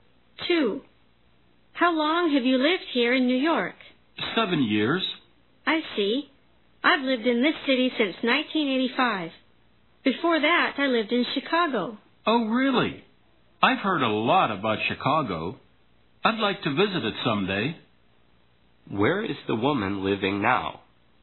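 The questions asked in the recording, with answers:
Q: Where is the woman living now?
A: In New York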